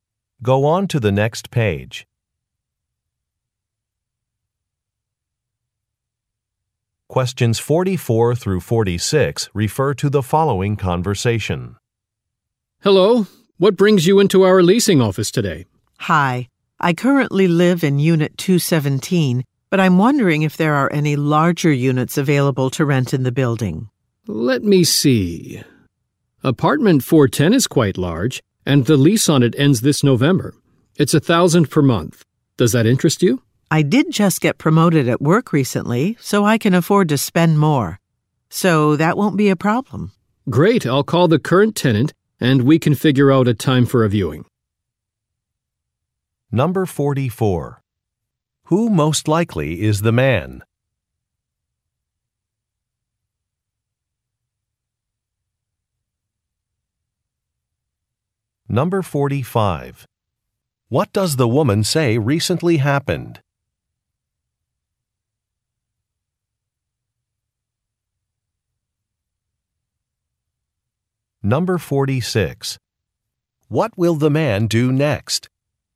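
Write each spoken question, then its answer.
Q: Who most likely is the man?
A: A leasing agent

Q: What does the woman say recently happened?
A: She got promoted at work

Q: What will the man do next?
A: Call the current tenant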